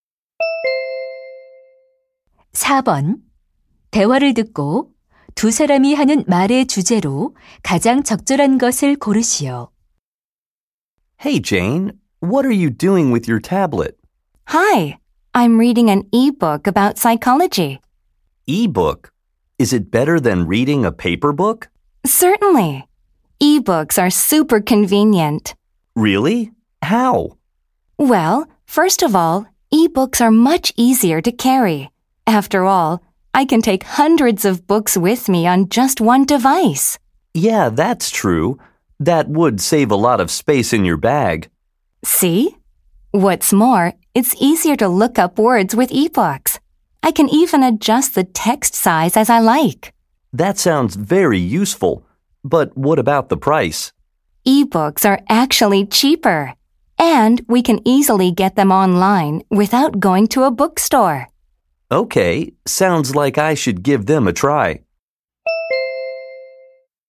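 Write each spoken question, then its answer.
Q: 대화를 듣고 두 사람이 하는 말의 주제로 가장 적절한 것을 고르시오.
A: 전자책의 장점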